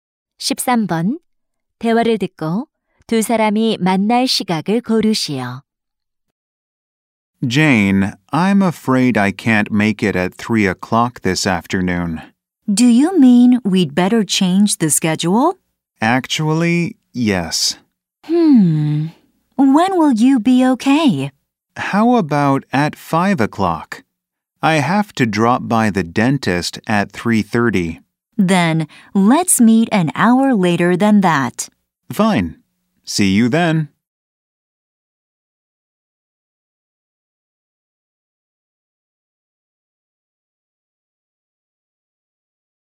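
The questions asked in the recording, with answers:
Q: 대화를 듣고 두 사람이 만날 시각을 고르시오.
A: 6시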